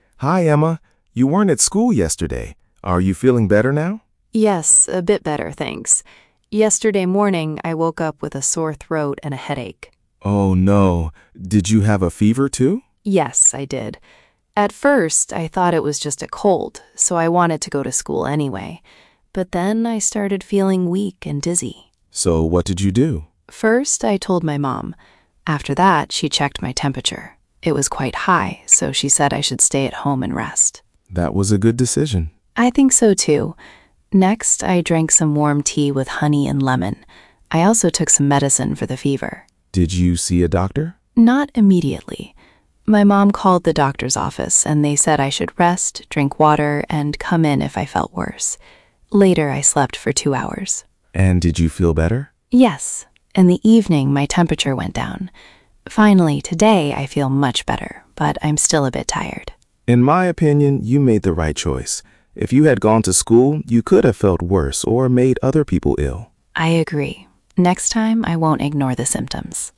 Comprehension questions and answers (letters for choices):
Przeczytaj pytania, a potem posłuchaj i wybierz właściwą odpowiedź.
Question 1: What is the conversation mainly about?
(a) Emma's school project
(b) Emma's health problem yesterday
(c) Liam's visit to the doctor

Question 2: What is Liam's opinion?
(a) Emma should have gone to school.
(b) Emma made the right choice by staying at home.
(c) Emma should not drink tea.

Uzupełnij zdania słowami sekwencji z nagrania:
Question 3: ________, Emma told her mum.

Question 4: ________, her mum checked her temperature.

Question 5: ________, Emma slept for two hours.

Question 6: ________, her temperature went down.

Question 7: Emma had a sore throat and a headache.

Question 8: She felt strong and full of energy.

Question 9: Her mum said she should stay at home.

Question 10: Emma went to school after taking medicine.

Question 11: The doctor's office said she should rest and drink water.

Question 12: Liam thinks Emma made a good decision.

Ułóż wydarzenia w prawidłowej kolejności (A–F):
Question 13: Emma drank warm tea with honey and lemon.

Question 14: Emma woke up with a sore throat and a headache.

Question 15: Emma's mum checked her temperature.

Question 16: Emma slept for two hours.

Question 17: Emma told her mum.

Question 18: Emma's temperature went down.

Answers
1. b
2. b
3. First
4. After that
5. Later
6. In the evening / Finally
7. True
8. False
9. True
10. False
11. True
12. True
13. 4
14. 1
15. 3
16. 5
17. 2
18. 6

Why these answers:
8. she felt weak and dizzy.
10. she stayed at home.

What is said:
Liam: Hi, Emma. You weren't at school yesterday. Are you feeling better now?
Emma: Yes, a bit better, thanks. Yesterday morning, I woke up with a sore throat and a headache.
Liam: Oh no. Did you have a fever too?
Emma: Yes, I did. At first, I thought it was just a cold, so I wanted to go to school anyway. But then I started feeling weak and dizzy.
Liam: So what did you do?
Emma: First, I told my mum. After that, she checked my temperature. It was quite high, so she said I should stay at home and rest.
Liam: That was a good decision.
Emma: I think so too. Next, I drank some warm tea with honey and lemon. I also took some medicine for the fever.
Liam: Did you see a doctor?
Emma: Not immediately. My mum called the doctor's office, and they said I should rest, drink water and come in if I felt worse. Later, I slept for two hours.
Liam: And did you feel better?
Emma: Yes. In the evening, my temperature went down. Finally, today I feel much better, but I'm still a bit tired.
Liam: In my opinion, you made the right choice. If you had gone to school, you could have felt worse or made other people ill.
Emma: I agree. Next time, I won't ignore the symptoms.

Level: A2+/B1